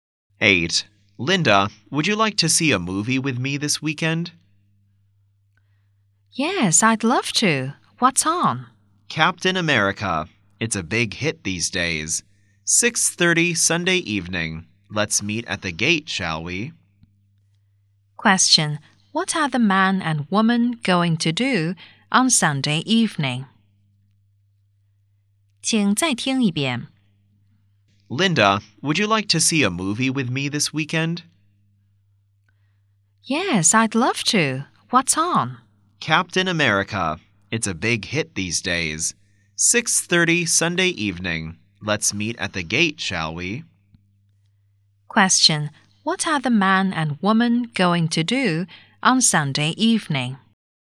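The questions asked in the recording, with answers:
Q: What are the man and woman going to do on Sunday evening?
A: See a movie (Captain America)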